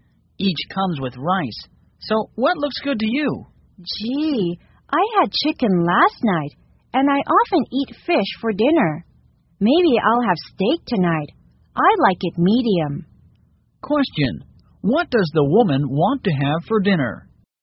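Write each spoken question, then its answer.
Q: what does the woman want to have for dinner?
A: Steak, medium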